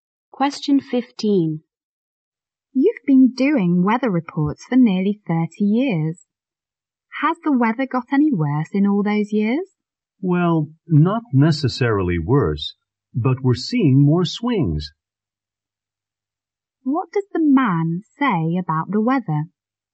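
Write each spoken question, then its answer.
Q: What does the man say about the weather?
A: There are more swings, but it isn't necessarily worse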